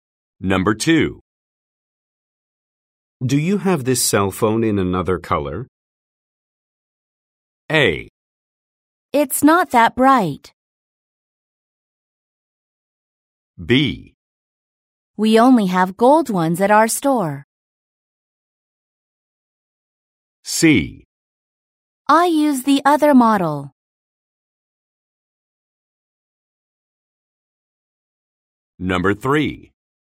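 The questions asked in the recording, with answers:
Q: Do you have this cell phone in another color?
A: B: We only have gold ones at our store.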